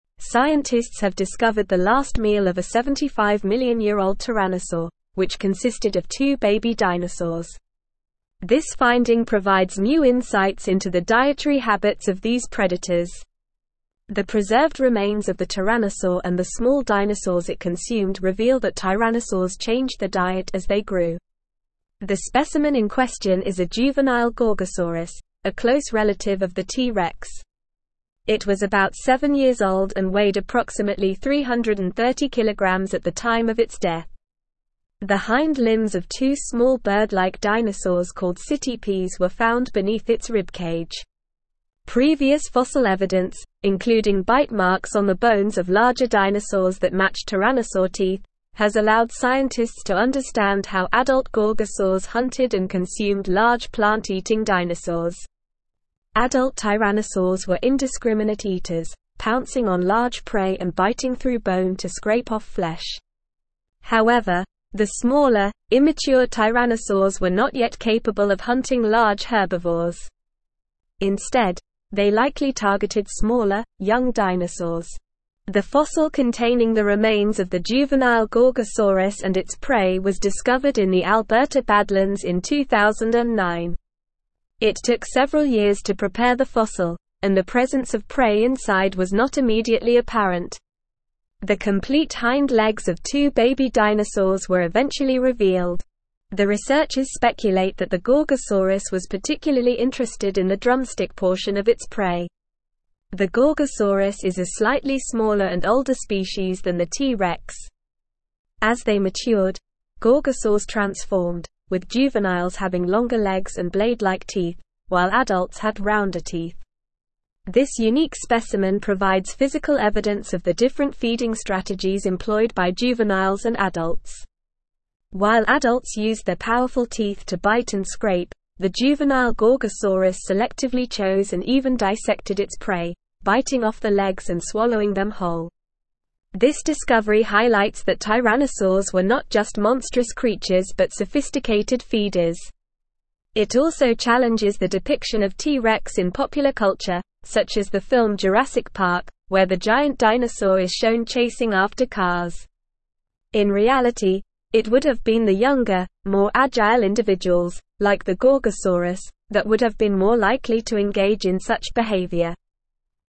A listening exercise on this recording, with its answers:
Listen and Fill in the Gaps:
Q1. Scientists have discovered the last meal of a 75-million-year-old (1)______, which consisted of two baby dinosaurs.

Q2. This finding provides new (2)______ into the dietary habits of these predators.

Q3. The preserved remains of the tyrannosaur and the small dinosaurs it (3)______ reveal that tyrannosaurs (4)______ their diet as they grew.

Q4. The preserved remains of the tyrannosaur and the small dinosaurs it (3)______ reveal that tyrannosaurs (4)______ their diet as they grew.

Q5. Previous fossil evidence, (5)______ bite marks on the bones of larger dinosaurs that match tyrannosaur teeth, has allowed scientists to understand how (6)______ gorgosaurs hunted and consumed large plant-eating dinosaurs.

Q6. Previous fossil evidence, (5)______ bite marks on the bones of larger dinosaurs that match tyrannosaur teeth, has allowed scientists to understand how (6)______ gorgosaurs hunted and consumed large plant-eating dinosaurs.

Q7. Adult tyrannosaurs were indiscriminate eaters, pouncing on large prey and (7)______ through bone to scrape off flesh.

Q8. The fossil containing the remains of the (8)______ gorgosaurus and its prey was discovered in the Alberta Badlands in 2009.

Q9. The complete hind legs of two baby dinosaurs were eventually (9)______.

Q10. The researchers (10)______ that the gorgosaurus was particularly (11)______ in the drumstick portion of its prey.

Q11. The researchers (10)______ that the gorgosaurus was particularly (11)______ in the drumstick portion of its prey.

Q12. This unique specimen provides physical evidence of the different feeding (12)______ employed by juveniles and adults.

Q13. This discovery (13)______ that tyrannosaurs were not just monstrous creatures but sophisticated feeders.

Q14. It also challenges the depiction of T. rex in popular culture, such as the film (14)______ Park, where the giant dinosaur is shown chasing after cars.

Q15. In reality, it would have been the younger, more (15)______ individuals, like the gorgosaurus, that would have been more likely to (16)______ in such behavior.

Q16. In reality, it would have been the younger, more (15)______ individuals, like the gorgosaurus, that would have been more likely to (16)______ in such behavior.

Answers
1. tyrannosaur
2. insights
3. consumed
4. changed
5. including
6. adult
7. biting
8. juvenile
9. revealed
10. speculate
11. interested
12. strategies
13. highlights
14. Jurassic
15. agile
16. engage

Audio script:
Scientists have discovered the last meal of a 75-million-year-old tyrannosaur, which consisted of two baby dinosaurs. This finding provides new insights into the dietary habits of these predators. The preserved remains of the tyrannosaur and the small dinosaurs it consumed reveal that tyrannosaurs changed their diet as they grew. The specimen in question is a juvenile gorgosaurus, a close relative of the T. rex. It was about seven years old and weighed approximately 330kg at the time of its death. The hind limbs of two small bird-like dinosaurs called citipes were found beneath its ribcage.
Previous fossil evidence, including bite marks on the bones of larger dinosaurs that match tyrannosaur teeth, has allowed scientists to understand how adult gorgosaurs hunted and consumed large plant-eating dinosaurs. Adult tyrannosaurs were indiscriminate eaters, pouncing on large prey and biting through bone to scrape off flesh. However, the smaller, immature tyrannosaurs were not yet capable of hunting large herbivores. Instead, they likely targeted smaller, young dinosaurs.
The fossil containing the remains of the juvenile gorgosaurus and its prey was discovered in the Alberta Badlands in 2009. It took several years to prepare the fossil, and the presence of prey inside was not immediately apparent. The complete hind legs of two baby dinosaurs were eventually revealed. The researchers speculate that the gorgosaurus was particularly interested in the drumstick portion of its prey.
The gorgosaurus is a slightly smaller and older species than the T. rex. As they matured, gorgosaurs transformed, with juveniles having longer legs and blade-like teeth, while adults had rounder teeth. This unique specimen provides physical evidence of the different feeding strategies employed by juveniles and adults. While adults used their powerful teeth to bite and scrape, the juvenile gorgosaurus selectively chose and even dissected its prey, biting off the legs and swallowing them whole.
This discovery highlights that tyrannosaurs were not just monstrous creatures but sophisticated feeders. It also challenges the depiction of T. rex in popular culture, such as the film Jurassic Park, where the giant dinosaur is shown chasing after cars. In reality, it would have been the younger, more agile individuals, like the gorgosaurus, that would have been more likely to engage in such behavior.

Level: Level 4